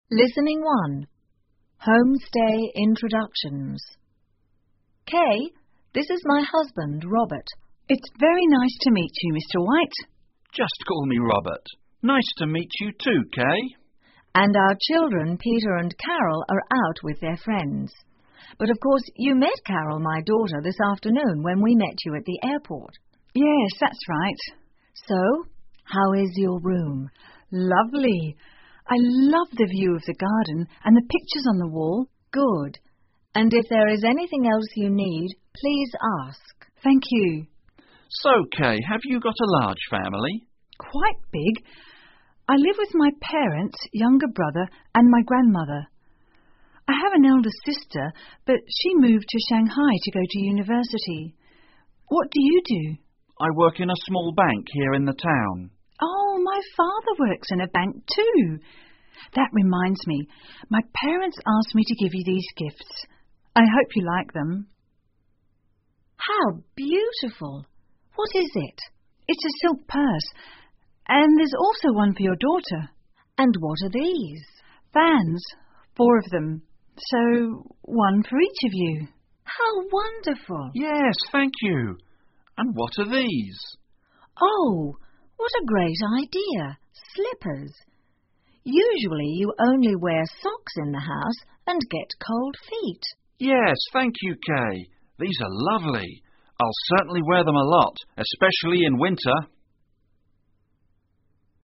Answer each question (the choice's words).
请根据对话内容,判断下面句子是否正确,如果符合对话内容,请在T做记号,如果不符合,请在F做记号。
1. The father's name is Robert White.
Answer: T

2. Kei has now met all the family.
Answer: F

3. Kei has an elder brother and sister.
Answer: F

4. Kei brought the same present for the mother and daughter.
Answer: T

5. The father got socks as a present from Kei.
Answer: F

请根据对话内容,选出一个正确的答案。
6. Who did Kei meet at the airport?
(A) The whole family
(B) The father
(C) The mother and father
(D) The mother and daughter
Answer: The mother and daughter

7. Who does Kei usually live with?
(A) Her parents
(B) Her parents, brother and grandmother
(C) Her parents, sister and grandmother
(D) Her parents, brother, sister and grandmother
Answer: Her parents, brother and grandmother

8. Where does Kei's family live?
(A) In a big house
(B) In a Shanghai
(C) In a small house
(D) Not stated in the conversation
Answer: Not stated in the conversation

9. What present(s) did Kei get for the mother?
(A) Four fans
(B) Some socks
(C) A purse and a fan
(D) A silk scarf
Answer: A purse and a fan

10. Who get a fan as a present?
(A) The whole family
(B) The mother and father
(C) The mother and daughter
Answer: The whole family

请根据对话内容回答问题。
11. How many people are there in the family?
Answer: Four

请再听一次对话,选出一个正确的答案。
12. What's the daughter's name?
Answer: Carol

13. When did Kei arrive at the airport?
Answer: This afternoon

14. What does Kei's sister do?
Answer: A (University) student

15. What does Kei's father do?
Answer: Work in a bank

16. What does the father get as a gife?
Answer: A fan and slippers

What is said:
Martha: Kei, this is my husband, Robert.
Kei: It's very nice to meet you, Mr White.
Robert: Just call me Robert. Nice to meet you, too, Kei.
M: And our children Peter and Carol are out with their friends. But of course, you met Carol, my daughter, this afternoon when we met you at the airport.
K: Yes, that's right.
M: So,how is your room?
K: Lovely.I love the view of the garden and the pictures on the wall.
M: Good.And if there is anything else you need, please ask.
K: Thank you.
R: So, Kei, have you got a large family?
K: Quite big. I live with my parents, younger brother and my grandmother. I have an elder sister but she moved to Shanghai to go to university. What do you do?
R: I work in a small bank here in the town.
K: Oh,my father works in a bank, too. That reminds me, my parents asked me to give you these gifts. I hope you like them.
M: How beautiful! What is it?
K: It's a silk purse. And there's also one for your daughter.
M: And what re these?
K: Fans. Four of them. So, one for each of you.
M: How wonderful!
R: Yes, thank you. And what are these?
M: Oh, what a great idea, slippers! Usually you only wear socks in the house and get cold feet.
I'll certainly wear them a lot, especially in winter.